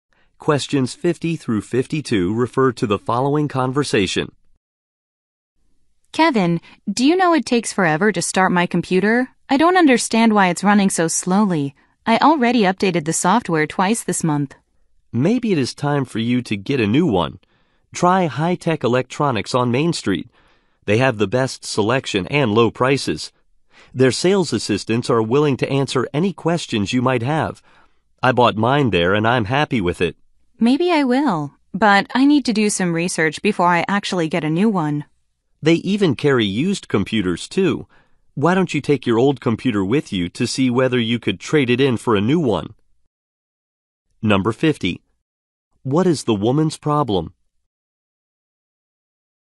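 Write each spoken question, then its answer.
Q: What is the woman's problem?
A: Her computer is running slowly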